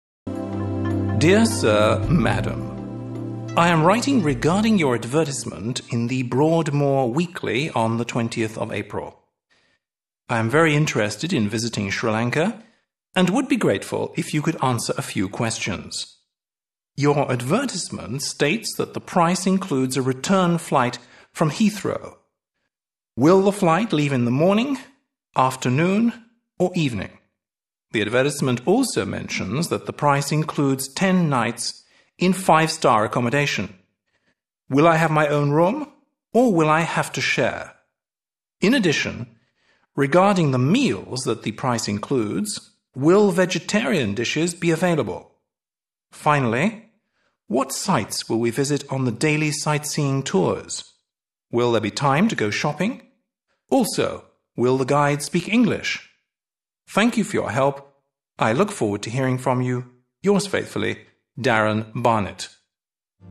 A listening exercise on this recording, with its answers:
3. Listen and fill in the missing words.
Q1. I am (1)............... regarding your advertisement in The Broadmoor Weekly on 20th April.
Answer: writing

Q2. I am very interested in visiting Sri Lanka and (2)............... be grateful if you could answer a (3)............... questions.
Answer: would

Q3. I am very interested in visiting Sri Lanka and (2)............... be grateful if you could answer a (3)............... questions.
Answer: few

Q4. Your advertisement states that the price includes a return flight (4)............... Heathrow.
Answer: from

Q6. Will there be time to go (6)...............?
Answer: shopping

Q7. I look (7)............... to hearing from you.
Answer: forward